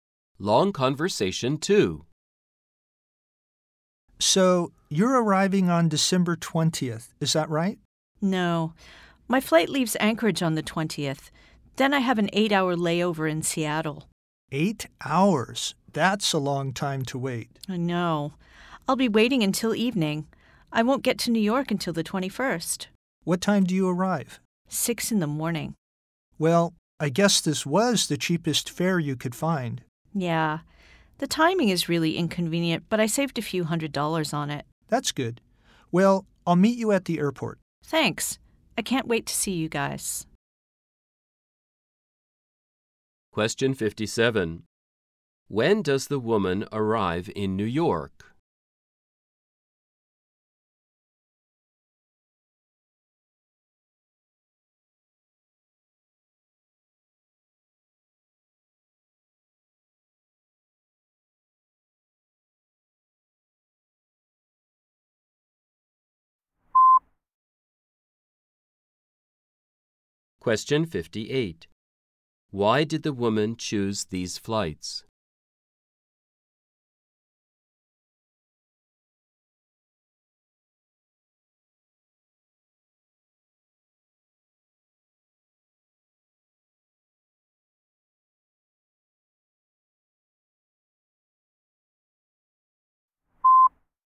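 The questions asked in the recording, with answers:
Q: When does the woman arrive in New York?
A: On December 21st at 6 in the morning

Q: Why did the woman choose these flights?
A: They were the cheapest fare; she saved a few hundred dollars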